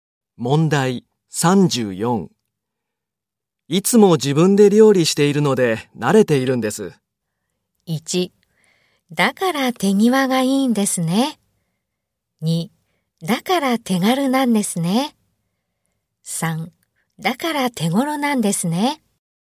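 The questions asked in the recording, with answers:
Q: いつも自分で料理しているので慣れているんです。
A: 1: だから手際がいいんですね。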